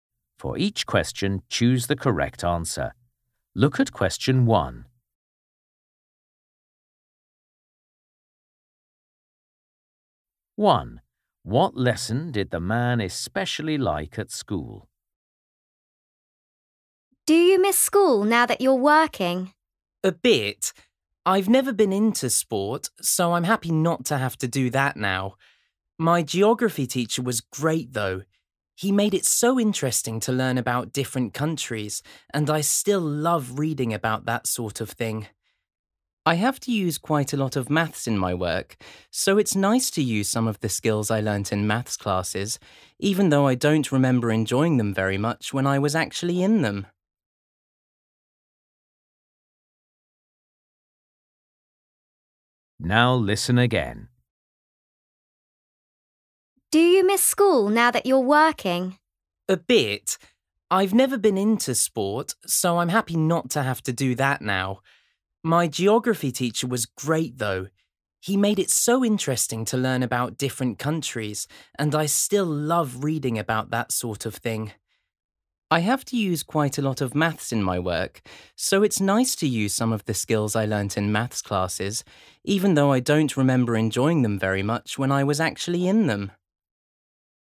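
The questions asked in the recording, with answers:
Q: What lesson did the man especially like at school?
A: geography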